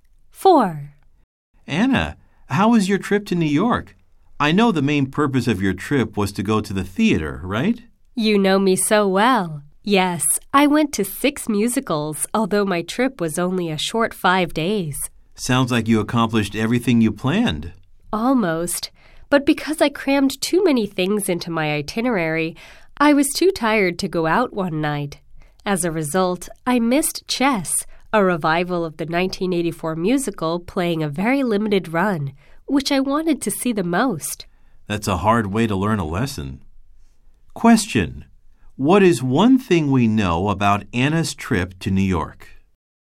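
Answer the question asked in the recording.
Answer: She missed Chess, the musical she most wanted to see, because she was too tired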